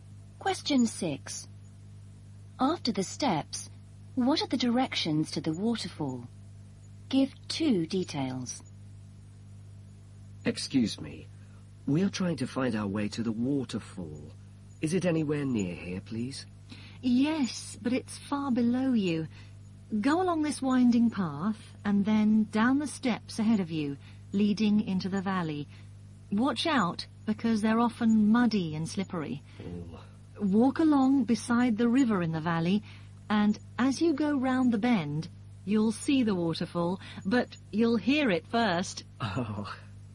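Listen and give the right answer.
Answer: Walk along beside the river in the valley, then go round the bend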